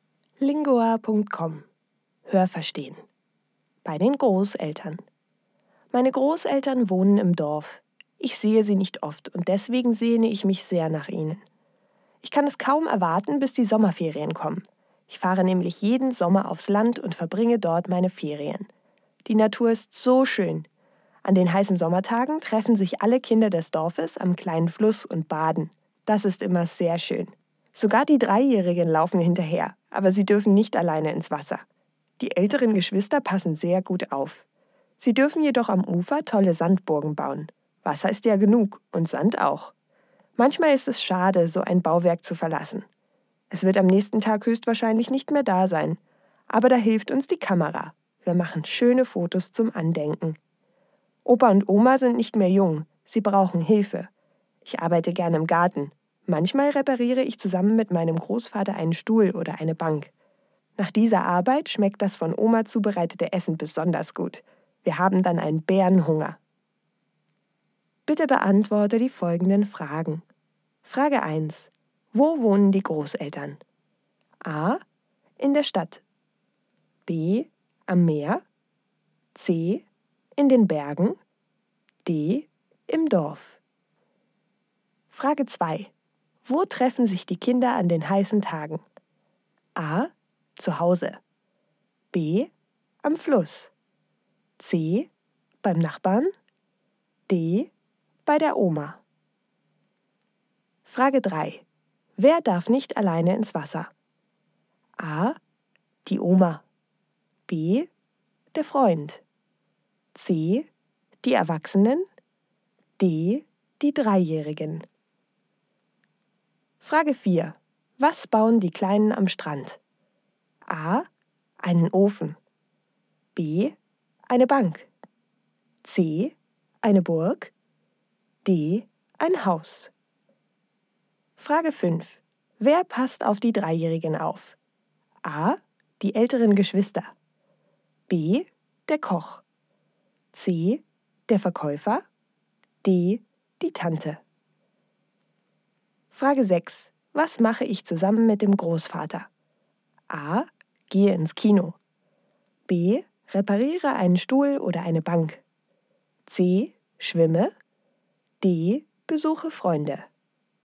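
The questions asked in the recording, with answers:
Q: Wo wohnen die Großeltern?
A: D: Im Dorf.

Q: Wo treffen sich die Kinder an den heißen Tagen?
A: B: Am Fluss.

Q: Wer darf nicht alleine ins Wasser?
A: D: Die Dreijährigen.

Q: Was bauen die Kleinen am Strand?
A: C: Eine Burg.

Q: Wer passt auf die Dreijährigen auf?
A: A: Die älteren Geschwister.

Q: Was mache ich zusammen mit dem Großvater?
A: B: Repariere einen Stuhl oder eine Bank.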